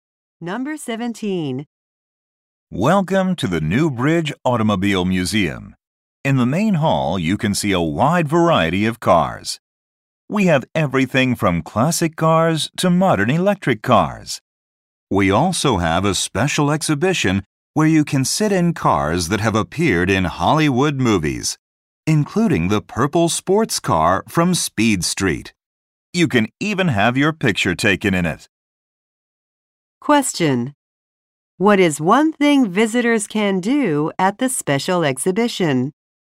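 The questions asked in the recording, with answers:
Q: What is one thing visitors can do at the special exhibition?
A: Sit in cars from Hollywood movies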